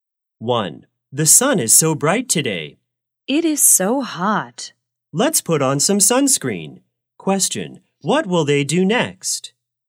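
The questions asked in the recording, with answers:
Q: Question, what will they do next?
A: Put on some sunscreen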